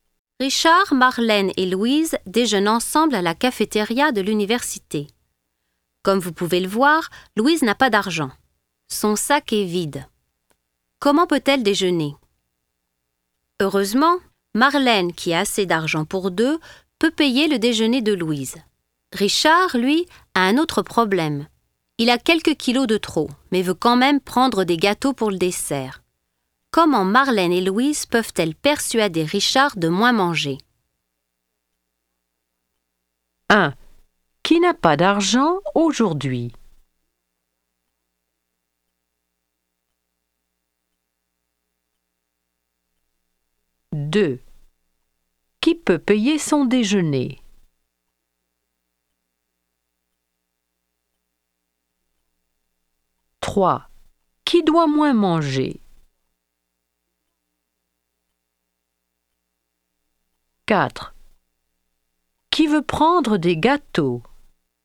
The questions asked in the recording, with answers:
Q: Qui n'a pas d'argent aujourd'hui?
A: 1. Louise.

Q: Qui peut payer son déjeuner?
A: 2. Marlène.

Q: Qui doit moins manger?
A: 3. Richard.

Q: Qui veut prendre des gâteaux?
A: 4. Richard.